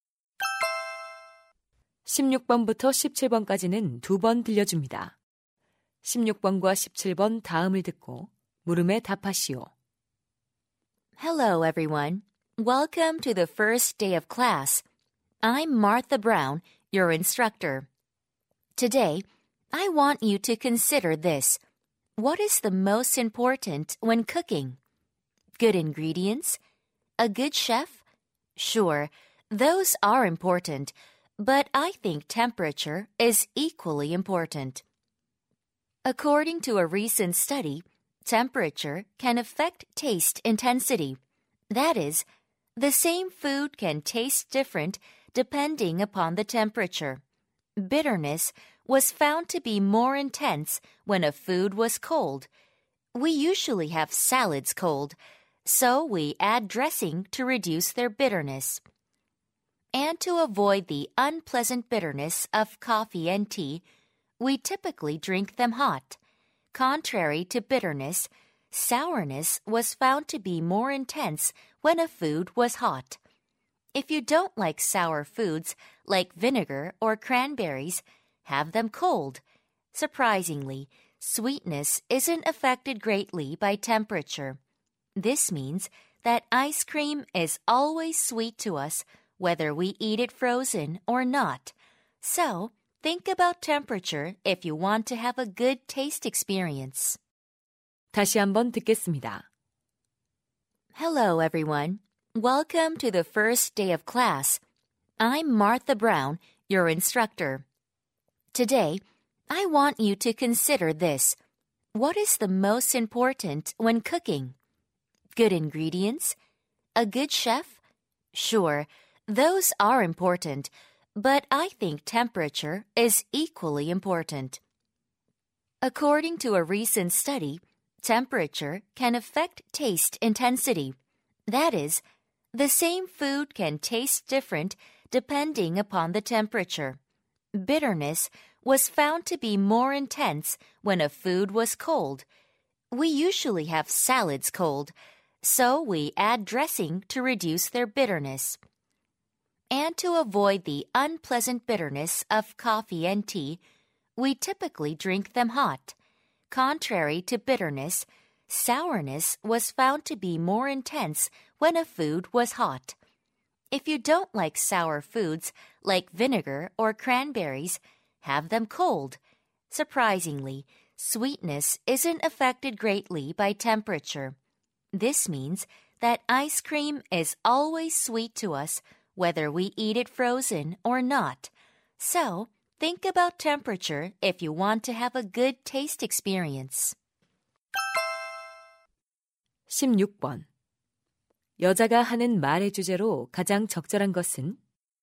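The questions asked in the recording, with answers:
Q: 여자가 하는 말의 주제로 가장 적절한 것은?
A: 온도가 음식 맛의 강도에 미치는 영향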